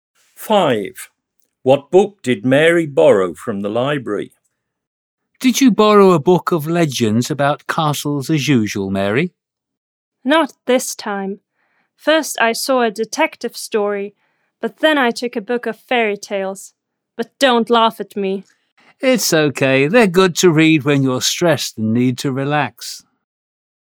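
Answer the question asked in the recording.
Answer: A book of fairy tales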